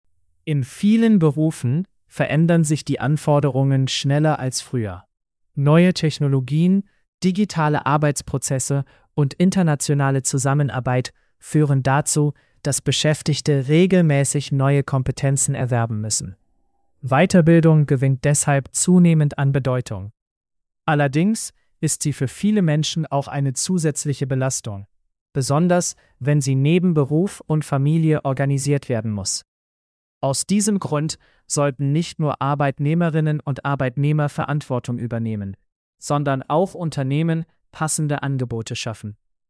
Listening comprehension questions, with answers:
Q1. Warum gewinnt Weiterbildung an Bedeutung?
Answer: Weil sich berufliche Anforderungen verändern.

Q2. Was ist ein Problem bei Weiterbildung?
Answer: Sie ist für manche Menschen eine zusätzliche Belastung.

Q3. Wer sollte laut Text Verantwortung übernehmen?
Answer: Arbeitnehmer und Unternehmen.

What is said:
In vielen Berufen verändern sich die Anforderungen schneller als früher. Neue Technologien, digitale Arbeitsprozesse und internationale Zusammenarbeit führen dazu, dass Beschäftigte regelmäßig neue Kompetenzen erwerben müssen. Weiterbildung gewinnt deshalb zunehmend an Bedeutung. Allerdings ist sie für viele Menschen auch eine zusätzliche Belastung, besonders wenn sie neben Beruf und Familie organisiert werden muss. Aus diesem Grund sollten nicht nur Arbeitnehmerinnen und Arbeitnehmer Verantwortung übernehmen, sondern auch Unternehmen passende Angebote schaffen.